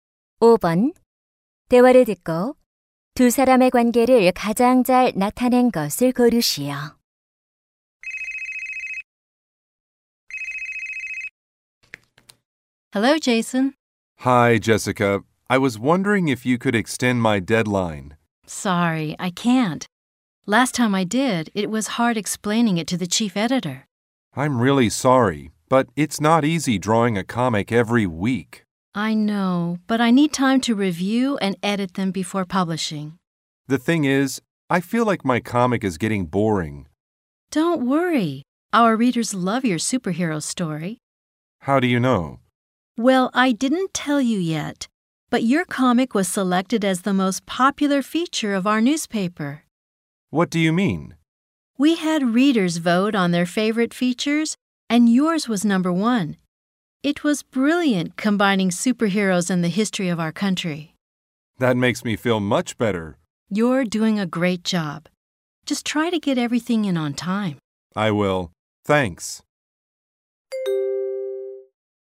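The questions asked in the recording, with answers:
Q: 대화를 듣고 두 사람의 관계를 가장 잘 나타낸 것을 고르시오.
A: 만화가 - 신문 편집자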